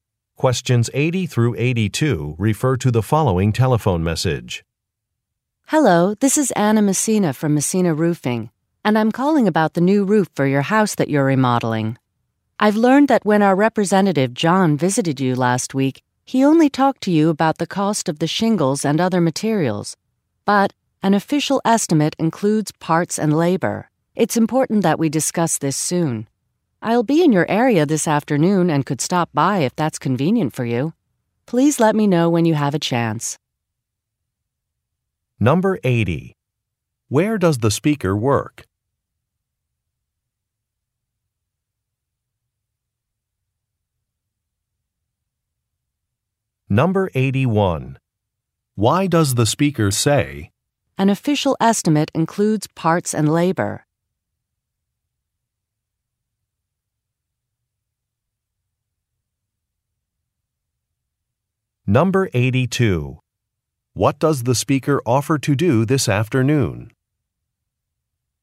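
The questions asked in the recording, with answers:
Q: Where does the speaker work?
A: At a roofing company (Messina Roofing)

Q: What does the speaker offer to do this afternoon?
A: Stop by the listener's house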